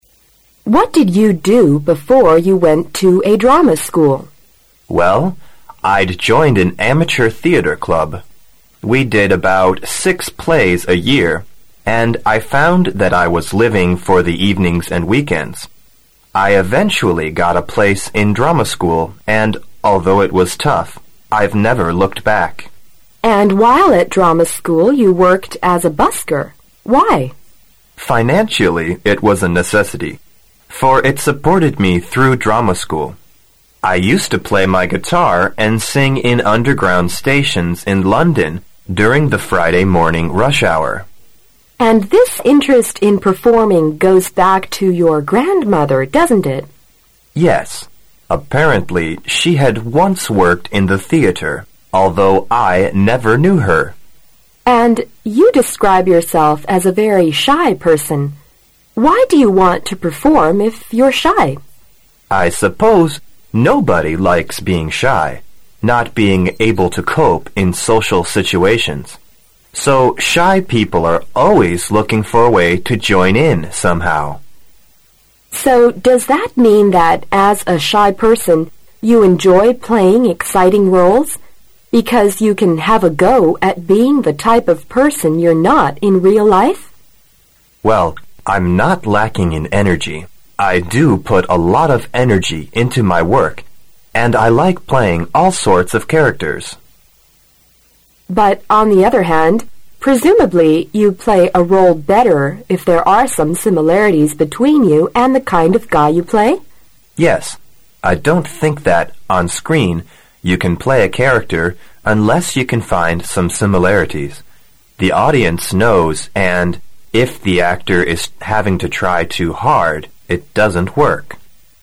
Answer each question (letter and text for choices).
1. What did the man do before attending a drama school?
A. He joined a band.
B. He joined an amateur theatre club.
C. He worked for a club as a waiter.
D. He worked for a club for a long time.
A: B. He joined an amateur theatre club.

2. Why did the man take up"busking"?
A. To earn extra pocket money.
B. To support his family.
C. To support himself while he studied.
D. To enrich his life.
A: C. To support himself while he studied.

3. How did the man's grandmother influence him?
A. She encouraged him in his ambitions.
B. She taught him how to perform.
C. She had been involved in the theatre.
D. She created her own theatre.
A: C. She had been involved in the theatre.

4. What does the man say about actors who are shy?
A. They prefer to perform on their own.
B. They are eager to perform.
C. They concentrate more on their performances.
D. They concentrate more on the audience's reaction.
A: B. They are eager to perform.

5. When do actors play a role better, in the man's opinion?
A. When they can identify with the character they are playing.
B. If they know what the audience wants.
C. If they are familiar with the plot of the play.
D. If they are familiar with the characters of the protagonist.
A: A. When they can identify with the character they are playing.

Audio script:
W: What did you do before you went to a drama school?
M: Well, I'd joined an amateur theatre club. We did about six plays a year, and I found that I was living for the evenings and weekends. I eventually got a place in a drama school and, although it was tough, I've never looked back.
W: And while at drama school you worked as a busker. Why?
M: Financially it was a necessity, for it supported me through drama school. I used to play my guitar and sing in underground stations in London during the Friday morning rash hour.
W: And this interest in performing goes back to your grandmother, doesn't it?
M: Yes, apparently she had once worked in the theatre, although I never knew her.
W: And you describe yourself as a very shy person. Why do you want to perform if you're shy?
M: I suppose nobody likes being shy, not being able to cope in social situations, so shy people are always looking for a way to join in somehow.
W: So does that mean that, as a shy person, you enjoy playing exciting roles, because you can have a goal at being the type of person you're not in real life?
M: Well, I'm not lacking in energy. I do put a lot of energy into my work and I like playing all sorts of characters.
W: But, on the other hand, presumably you play a role better if there are some similarities between you and the kind of guy you play?
M: Yes, I don't think that. On screen you can play a character unless you can find some similarities. The audience knows. And if the actor is, having to try too hard, it doesn't work.